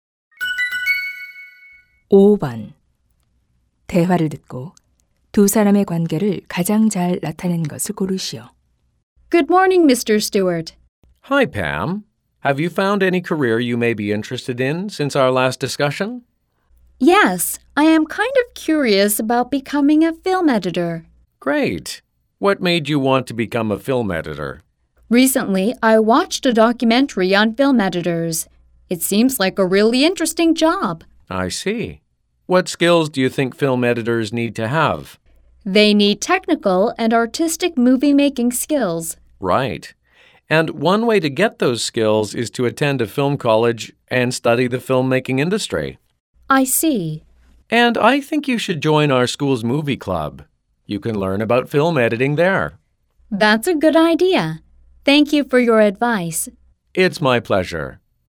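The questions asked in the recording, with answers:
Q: 대화를 듣고 두 사람의 관계를 가장 잘 나타낸 것을 고르시오.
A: 진로 상담 교사 - 학생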